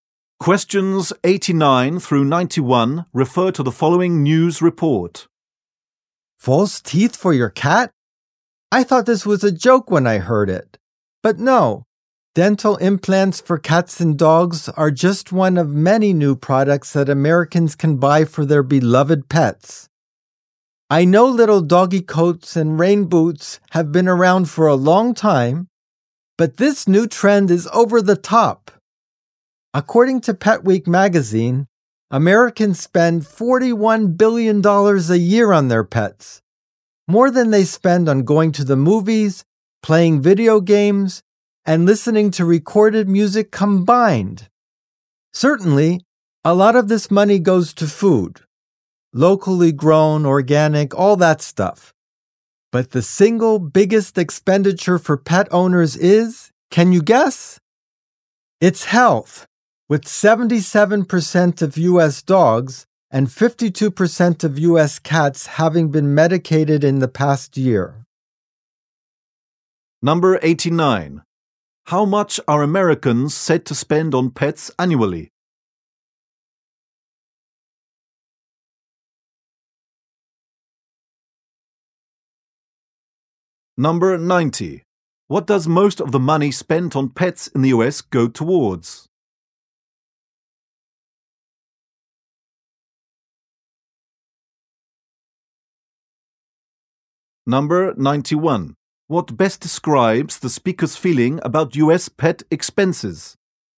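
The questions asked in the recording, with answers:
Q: How much are Americans said to spend on pets annually?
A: $41 billion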